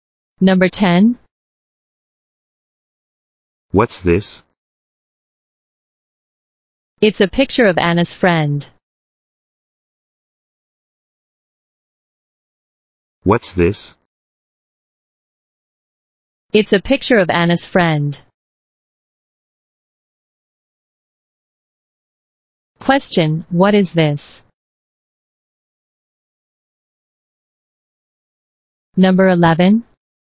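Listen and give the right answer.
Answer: A picture of Anna's friend.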